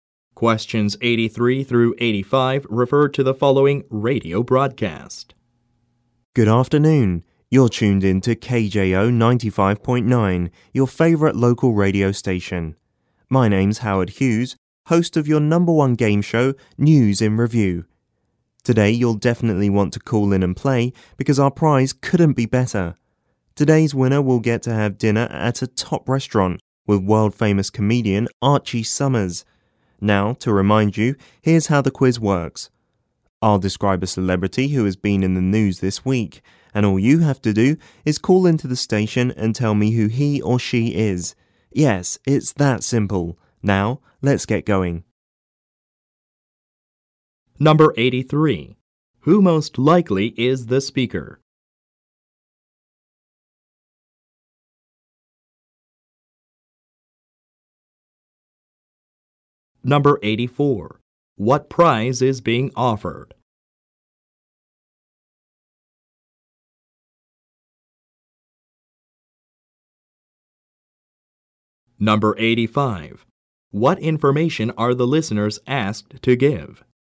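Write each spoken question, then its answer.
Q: Who most likely is the speaker?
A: A radio game show host

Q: What prize is being offered?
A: Dinner at a top restaurant with comedian Archie Summers

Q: What information are the listeners asked to give?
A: The name of a celebrity who has been in the news this week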